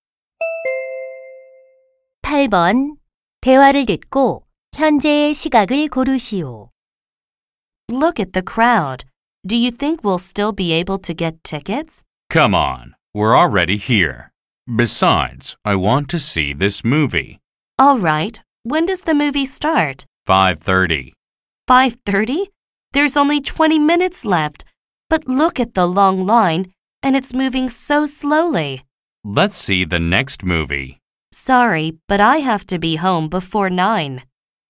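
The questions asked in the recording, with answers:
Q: 대화를 듣고 현재의 시각을 고르시오.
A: 5시 10분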